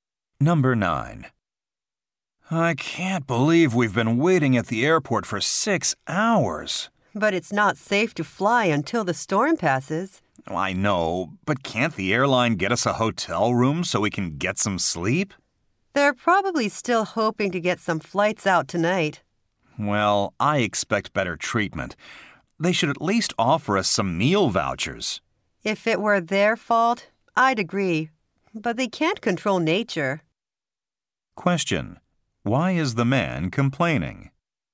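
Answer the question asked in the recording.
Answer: The airline isn't providing a hotel or meals during the delay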